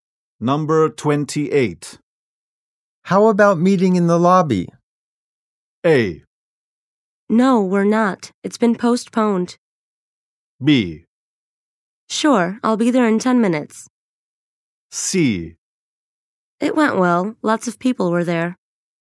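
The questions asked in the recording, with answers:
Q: How about meeting in the lobby?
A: B: Sure, I'll be there in 10 minutes.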